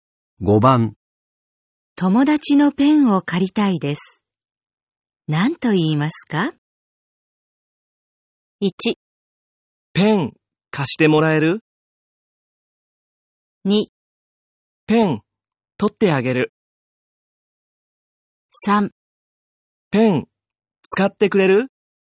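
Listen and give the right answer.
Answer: 1: ペン貸してもらえる?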